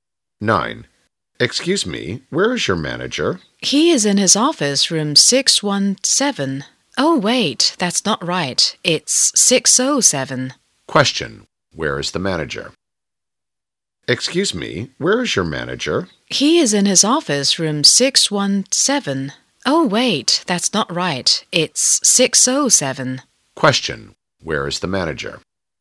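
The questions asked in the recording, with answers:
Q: Where is the manager?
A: In his office, room 607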